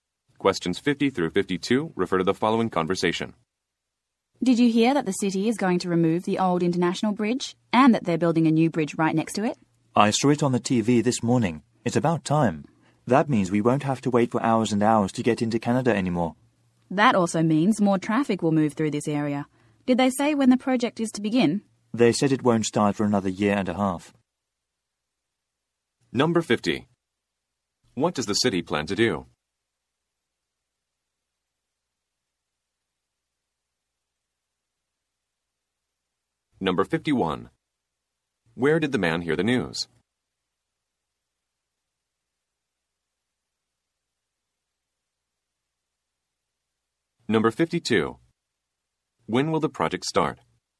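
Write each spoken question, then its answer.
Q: What does the city plan to do?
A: Replace the old international bridge with a new one

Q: When will the project start?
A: In a year and a half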